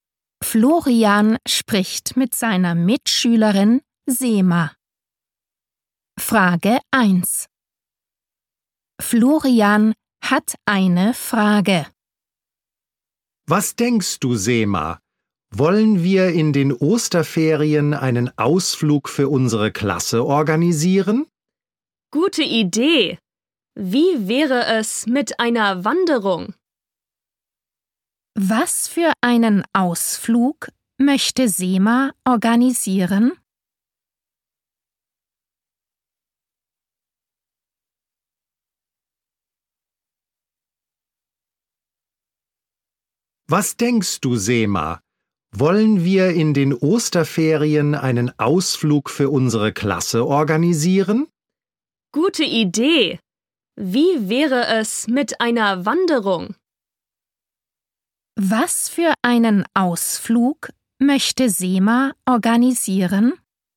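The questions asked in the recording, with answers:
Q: Was für einen Ausflug möchte Sema organisieren?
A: Eine Wanderung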